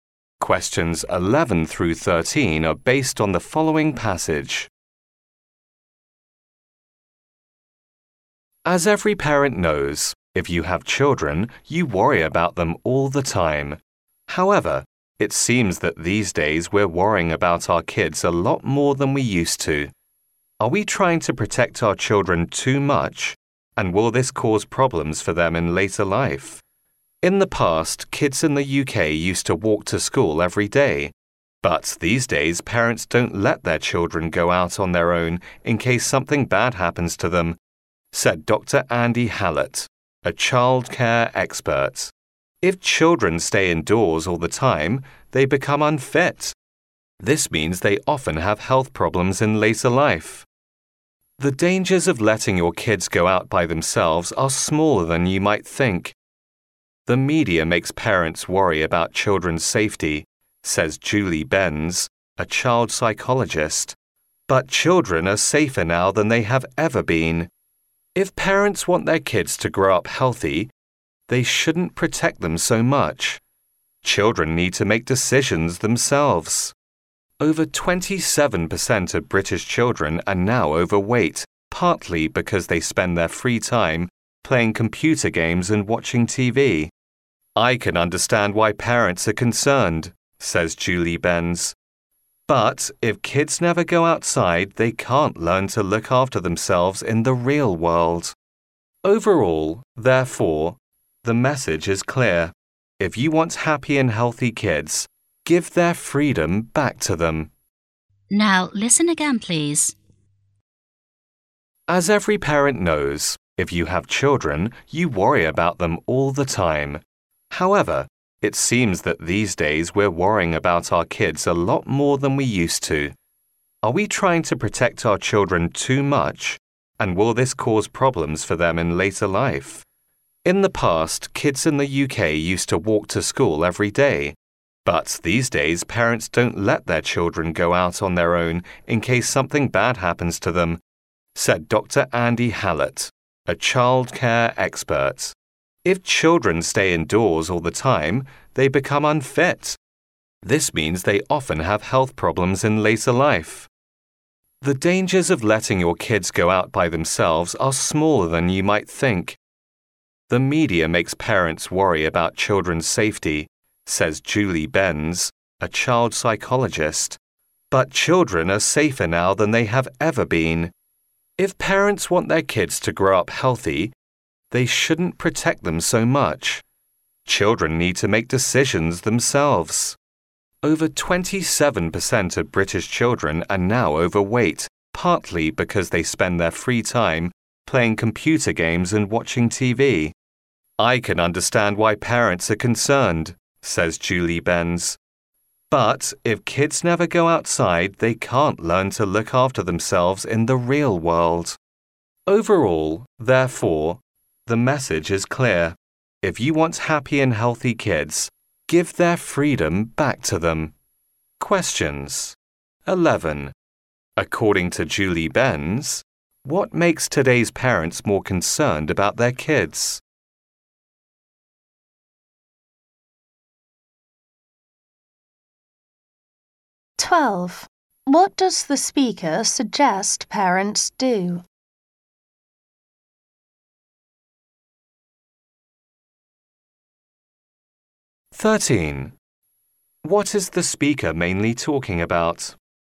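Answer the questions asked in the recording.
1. The media
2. Give their children more freedom.
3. Parents protecting their children too much.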